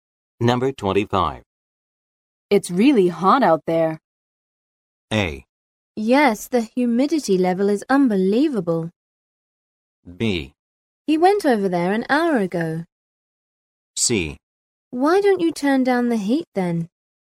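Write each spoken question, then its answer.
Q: It's really hot out there.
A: A: Yes, the humidity level is unbelievable.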